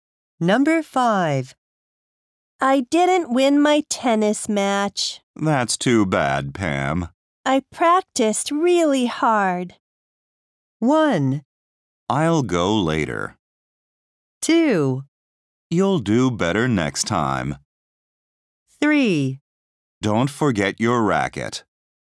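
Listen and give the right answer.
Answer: 2: You'll do better next time.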